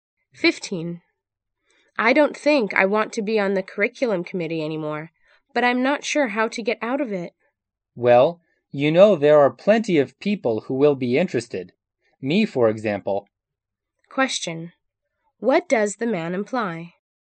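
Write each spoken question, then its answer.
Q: What does the man imply?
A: He would be interested in taking her place on the committee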